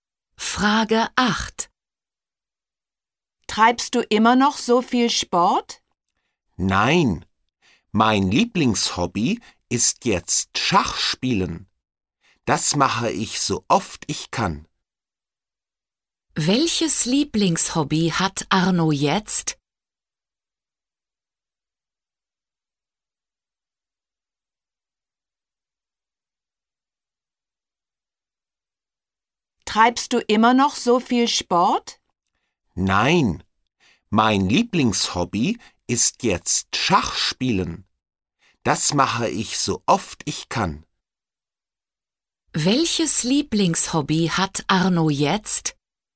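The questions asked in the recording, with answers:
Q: Welches Lieblingshobby hat Arno jetzt?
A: Schachspielen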